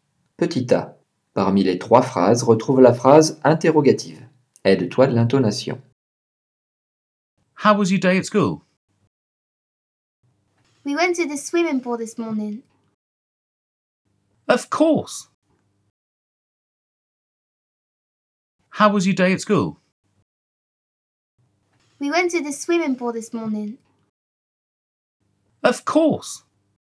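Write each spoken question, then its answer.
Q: Parmi les 3 phrases, retrouve la phrase interrogative.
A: How was your day at school?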